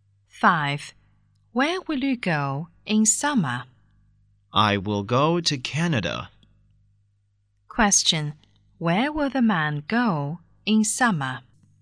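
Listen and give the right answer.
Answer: Canada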